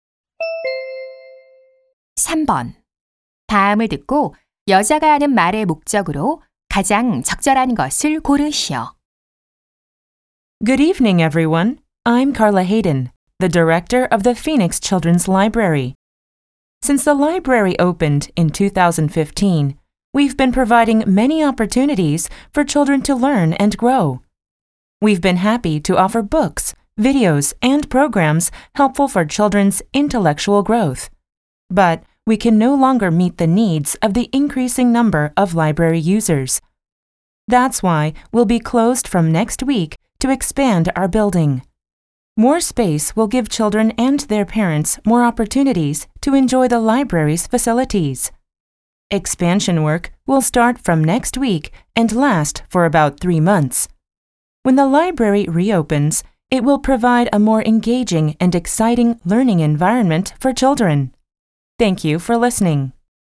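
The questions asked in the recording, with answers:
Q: 다음을 듣고 여자가 하는 말의 목적으로 가장 적절한 것을 고르시오.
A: 도서관 확장 공사로 인한 휴관을 알리려고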